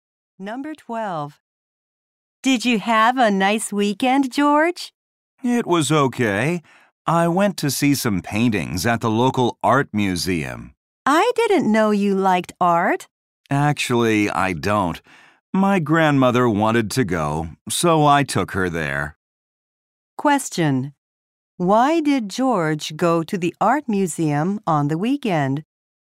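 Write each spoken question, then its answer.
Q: Why did George go to the art museum on the weekend?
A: His grandmother wanted to go.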